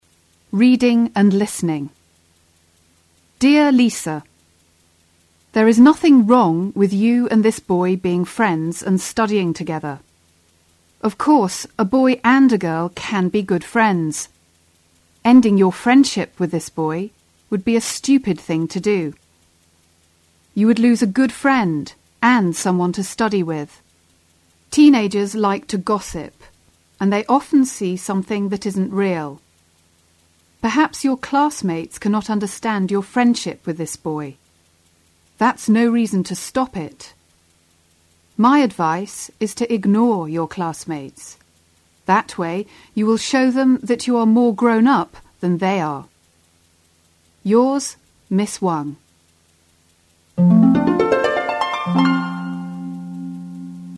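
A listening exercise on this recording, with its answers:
2 Listen to the tape and try to spell the words as you hear their pronunciation. Then divide each of the sentences into several sense groups.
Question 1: There is nothing wrong with you and this boy __________ friends and __________ together.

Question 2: _________ your friendship with this boy would be a __________ thing to do.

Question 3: Teenagers like to __________, and they often see something that isn't real.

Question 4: My advice is to __________ your classmates. That way you will __________them that you are more __________ than they are.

3 Listen to the tape again and use the exercise above to help you answer the following questions.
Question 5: What does Miss Wang say about their friendship?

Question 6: Why does Miss Wang think it would be foolish if they end their friendship?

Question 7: How does she explain why Lisa' classmates gossip about their friendship?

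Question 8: What is Miss Wang's advice?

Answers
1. being; studying
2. Ending; stupid
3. gossip
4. ignore; show; grown up
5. There is nothing wrong with them being friends; a boy and a girl can be good friends.
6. Lisa would lose a good friend and someone to study with.
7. Teenagers like to gossip and often see something that isn't real; perhaps they cannot understand the friendship.
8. Ignore her classmates, to show them she is more grown up than they are.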